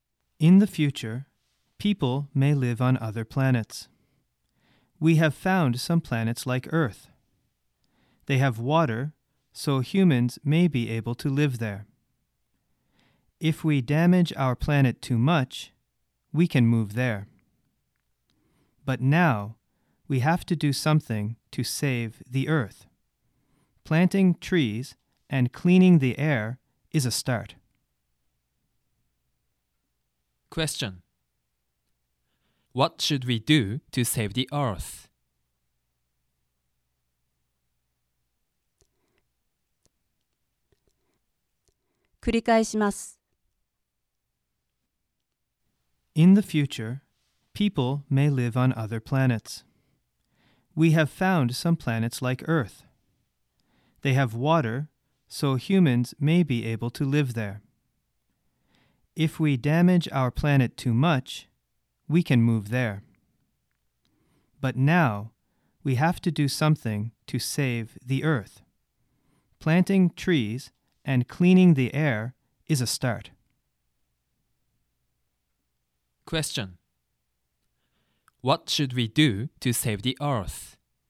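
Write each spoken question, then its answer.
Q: What should we do to save the Earth?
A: Plant trees and clean the air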